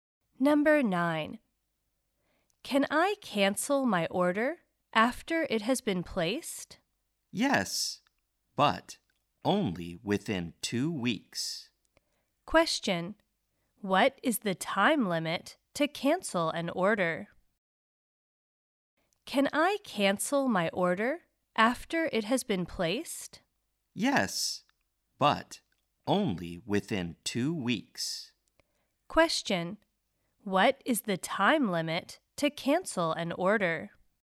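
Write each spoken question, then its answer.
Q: what is the time limit to cancel an order?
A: Within 2 weeks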